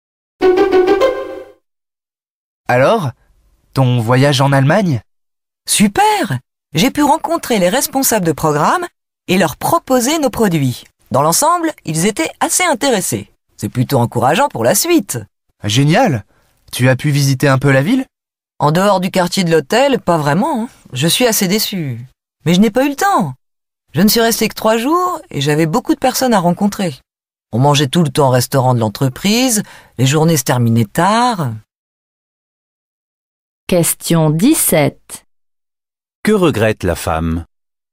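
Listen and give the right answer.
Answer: De ne pas avoir pu visiter la ville.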